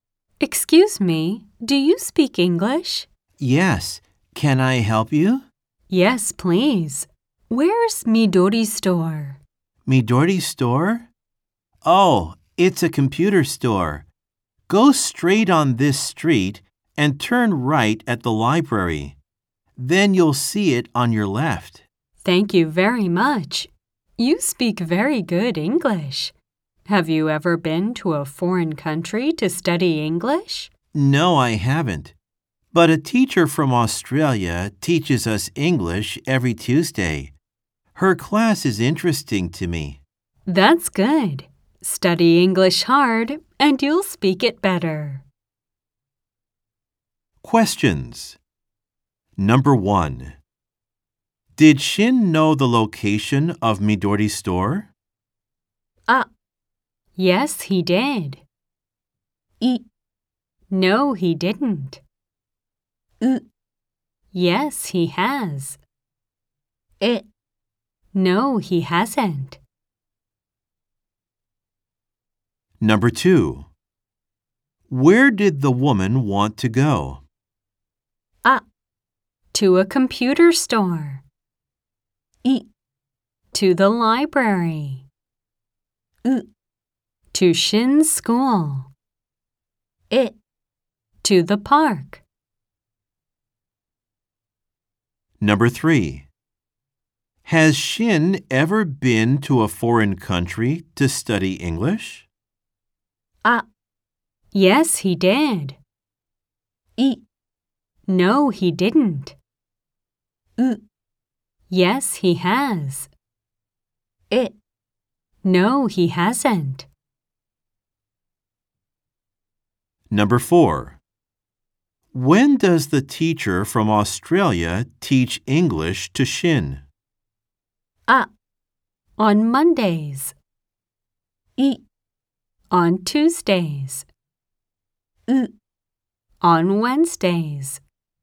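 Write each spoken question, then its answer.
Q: Did Shin know the location of Midori's store?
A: あ: Yes, he did.

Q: Where did the woman want to go?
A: あ: To a computer store.

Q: Has Shin ever been to a foreign country to study English?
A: え: No, he hasn't.

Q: When does the teacher from Australia teach English to Shin?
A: い: On Tuesdays.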